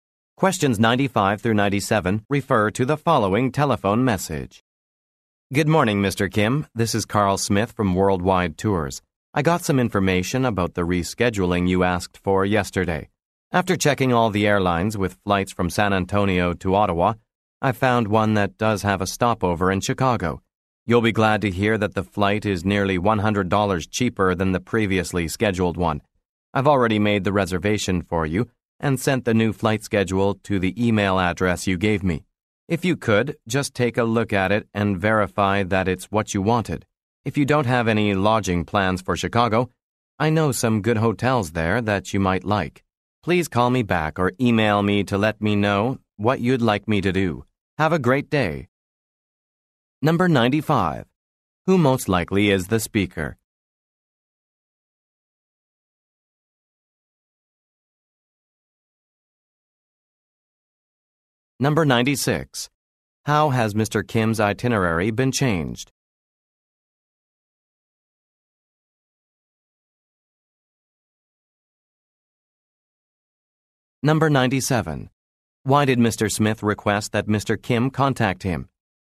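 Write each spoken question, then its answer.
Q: Who most likely is the speaker?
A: A travel agent

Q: How has Mr. Kim's itinerary been changed?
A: His new flight has a stopover in Chicago and is cheaper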